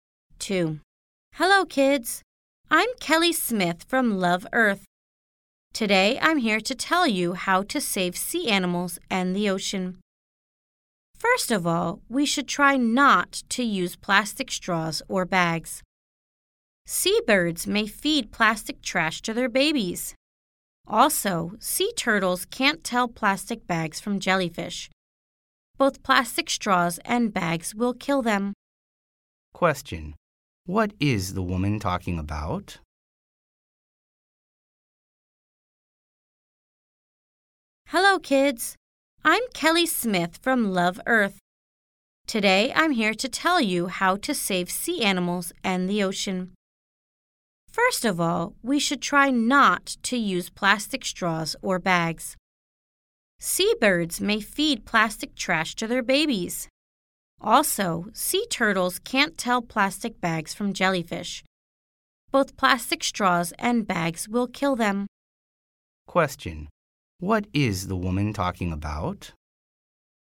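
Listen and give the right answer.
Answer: How to save sea animals and the ocean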